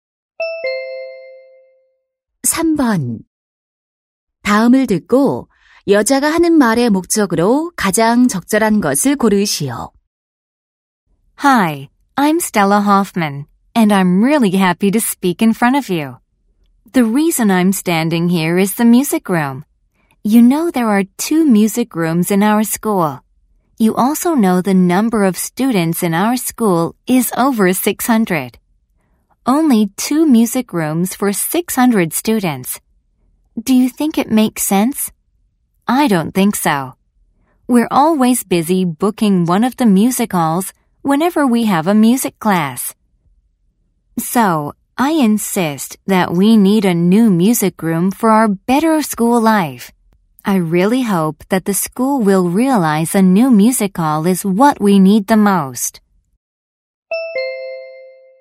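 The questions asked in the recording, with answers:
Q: 다음을 듣고 여자가 하는 말의 목적으로 가장 적절한 것을 고르시오.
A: 새 음악실이 필요하다고 주장하려고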